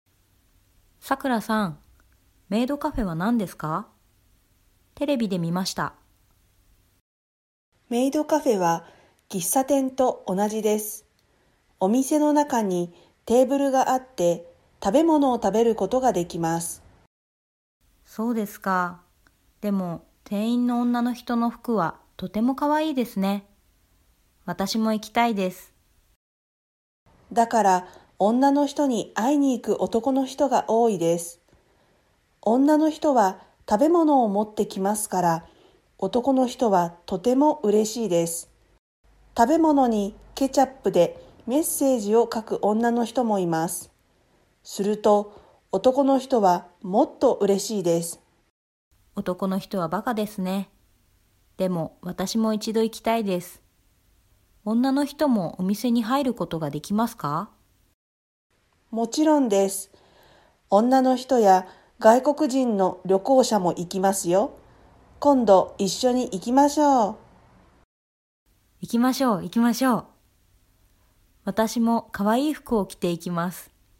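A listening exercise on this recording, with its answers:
Prenez des notes sur ce que vous comprenez, puis répondez aux questions.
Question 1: メイドカフェはどんなところですか。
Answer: 喫茶店と同じです。テーブルがあって、食べ物を食べることができます。店員の女の人の服がとても可愛いです。

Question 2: メイドカフェで何ができますか。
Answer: 食べ物を食べることができます。

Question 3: 外国人はメイドカフェに行くことができますか。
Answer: はい、外国人の旅行者も行きます。

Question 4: どうしてメイドカフェに行く男の人はとてもうれしいですか。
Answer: 女の人が食べ物を持ってきますから。ケチャップでメッセージを書く人もいます。

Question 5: さくらさんとまさきさんはメイドカフェに行きたいですか。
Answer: はい、今度一緒に行きます。

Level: MODULE 4 : Extension JLPT5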